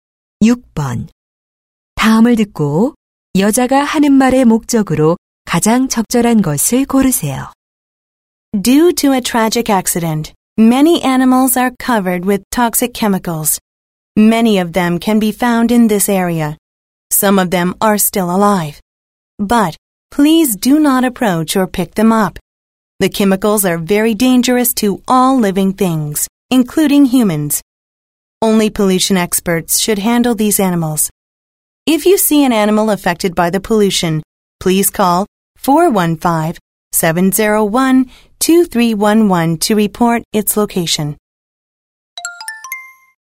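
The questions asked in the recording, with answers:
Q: 다음을 듣고 여자가 하는 말의 목적으로 가장 적절한 것을 고르세요.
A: 오염된 동물에 접근하지 말고 신고하도록 당부하려고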